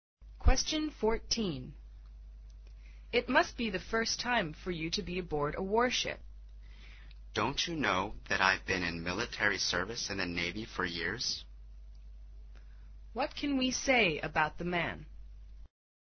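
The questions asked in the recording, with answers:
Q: What can we say about the man?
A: He has served in the Navy for years

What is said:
14. W: It must be the first time for you to be aboard a warship.
M: Don't you know that I've been in military service in the Navy for years?
Q: What can we say about the man? 【解析】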